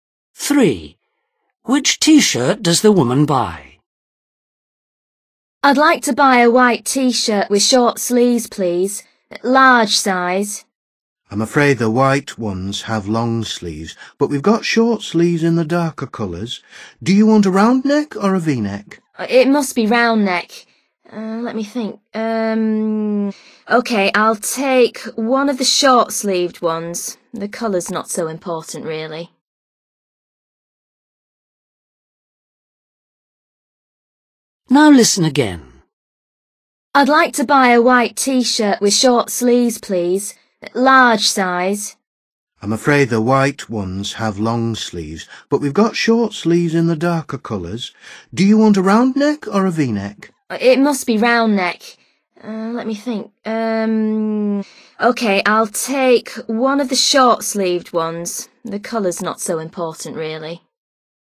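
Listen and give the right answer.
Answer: a dark-coloured short-sleeved T-shirt with a round neck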